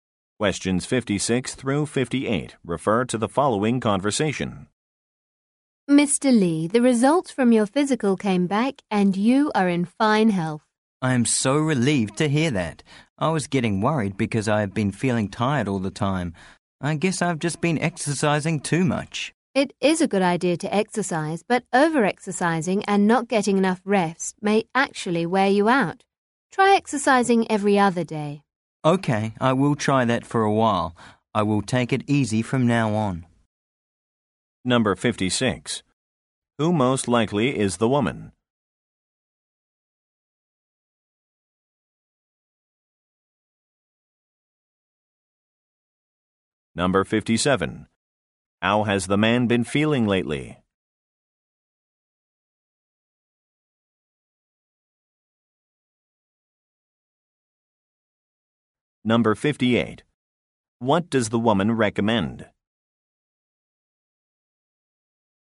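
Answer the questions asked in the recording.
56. A doctor
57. Tired
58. Exercising every other day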